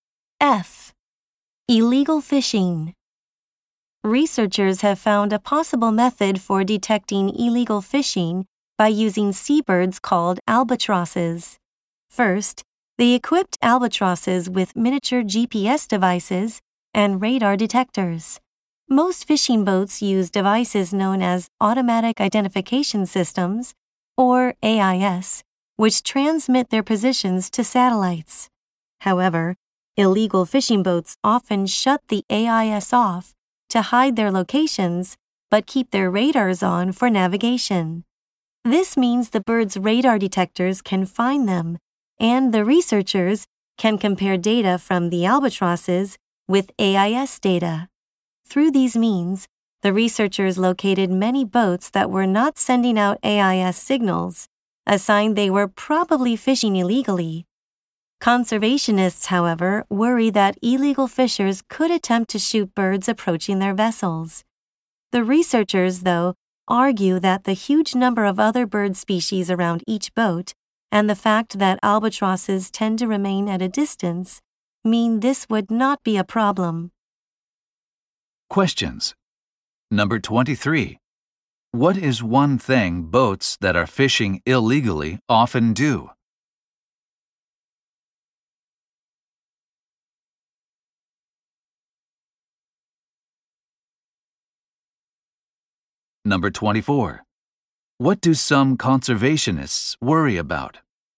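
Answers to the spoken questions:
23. Turn off their AIS to hide their location
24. Illegal fishers might shoot albatrosses that approach their boats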